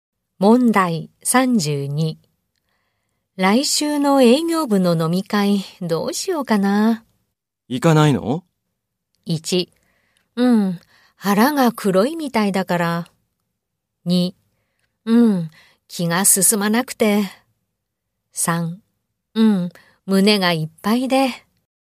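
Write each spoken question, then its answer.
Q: 来週の営業部の飲み会、どうしようかな。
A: 2: うん、気が進まなくて。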